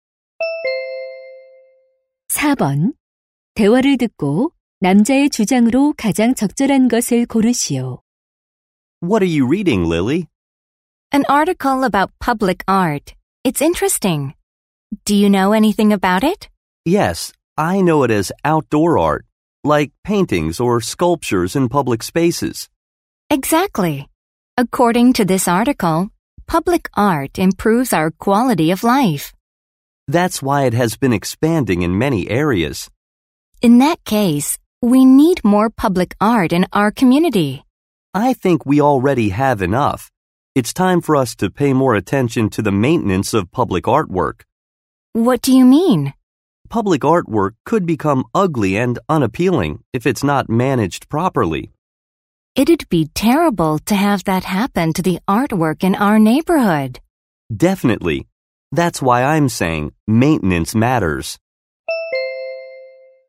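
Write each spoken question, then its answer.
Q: 대화를 듣고 남자의 주장으로 가장 적절한 것을 고르시오.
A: 공공 예술 작품의 관리(유지 보수)에 더 관심을 기울여야 한다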